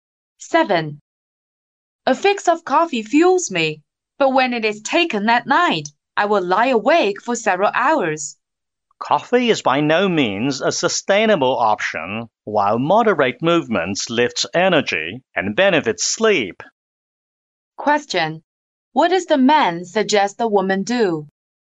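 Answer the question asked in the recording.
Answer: Do moderate exercise instead of drinking coffee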